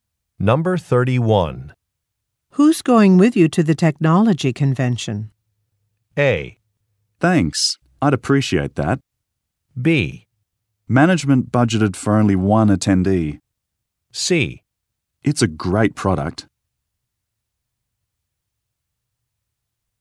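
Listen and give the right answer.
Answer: B: Management budgeted for only one attendee.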